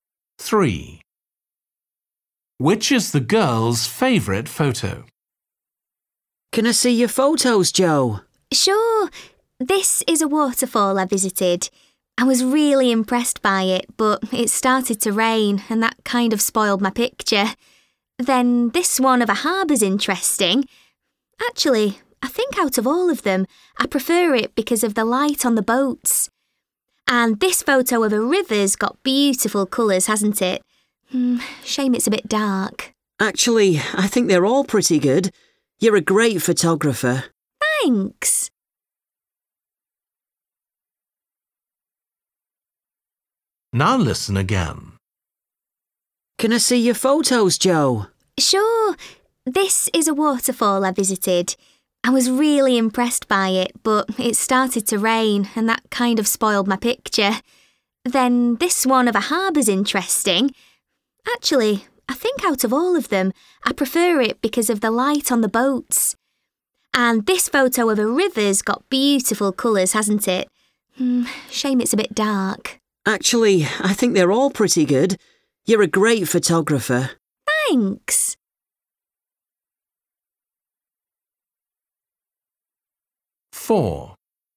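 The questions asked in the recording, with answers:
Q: Which is the girl's favourite photo?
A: the harbour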